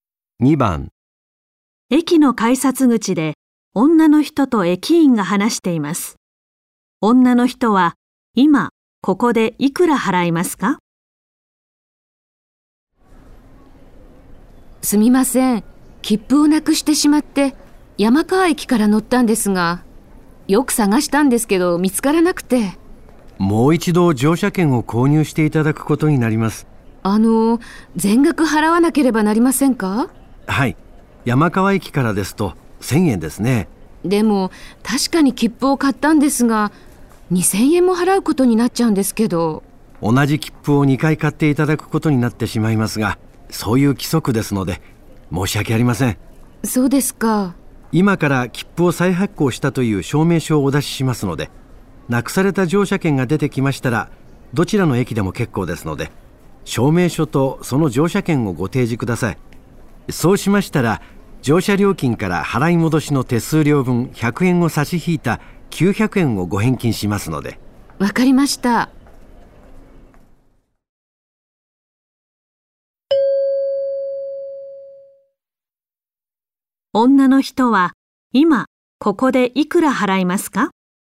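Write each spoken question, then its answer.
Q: 女の人は今ここでいくら払いますか?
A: 1000円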